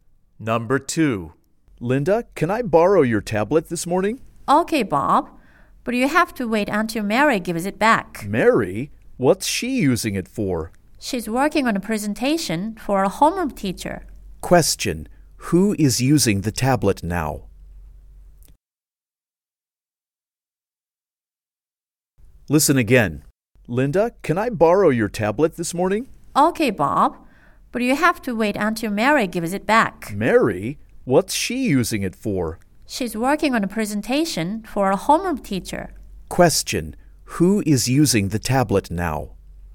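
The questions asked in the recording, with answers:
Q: Who is using the tablet now?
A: Mary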